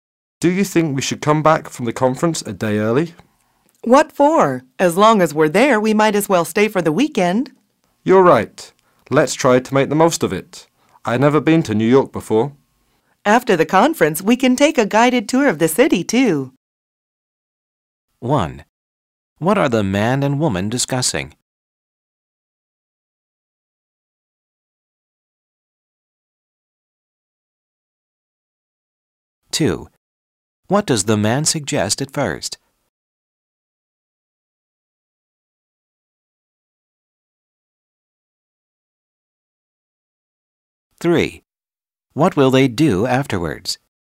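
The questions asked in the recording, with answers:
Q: What are the man and woman discussing?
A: Whether to come back from the conference early

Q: What will they do afterwards?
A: Take a guided tour of New York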